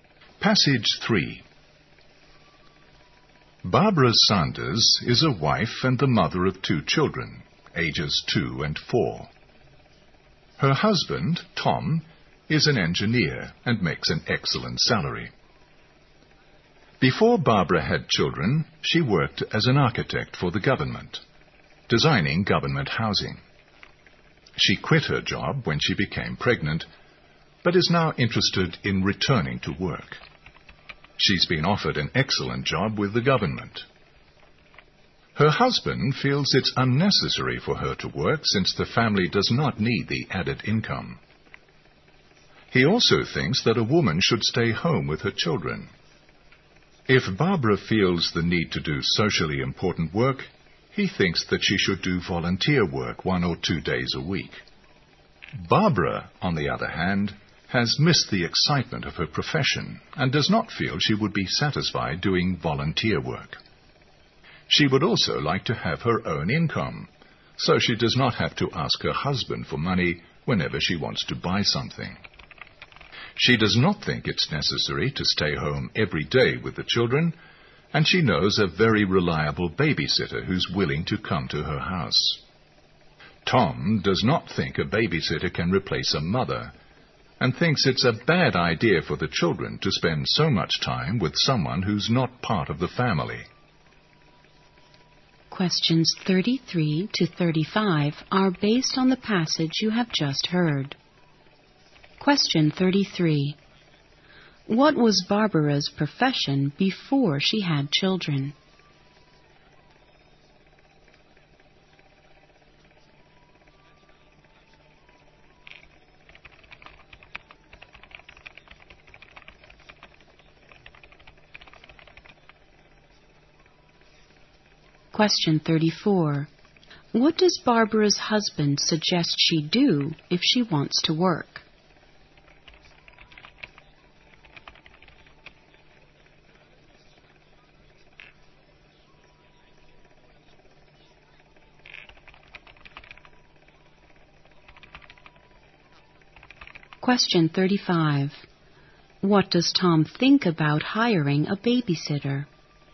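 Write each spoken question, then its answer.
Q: What was Barbara's profession before she had children?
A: Architect

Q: What does Barbara's husband suggest she do if she wants to work?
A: Do volunteer work one or two days a week

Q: What does Tom think about hiring a babysitter?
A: A babysitter can't replace a mother, and it's bad for the children to spend so much time with someone outside the family.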